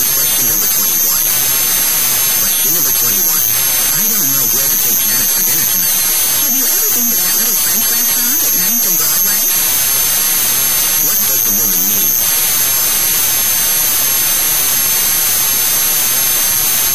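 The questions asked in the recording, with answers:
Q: What does the woman mean?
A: The man could take Janet to the little French restaurant at 9th and Broadway.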